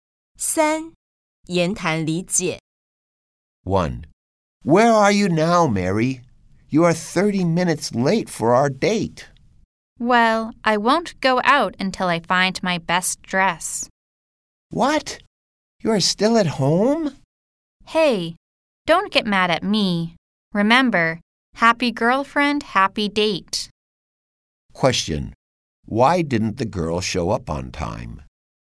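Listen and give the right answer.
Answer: She was still at home looking for her best dress.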